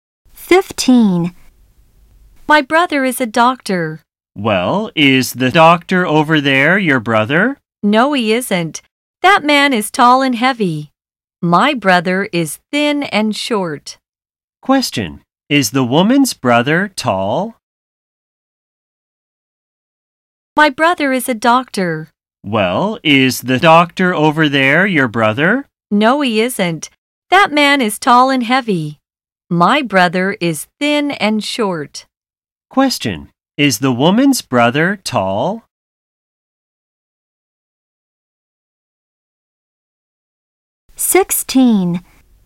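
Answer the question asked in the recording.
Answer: No, he is thin and short.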